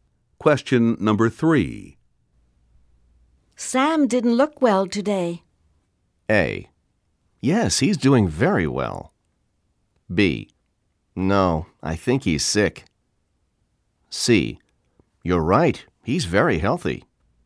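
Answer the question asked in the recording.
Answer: B: No, I think he's sick.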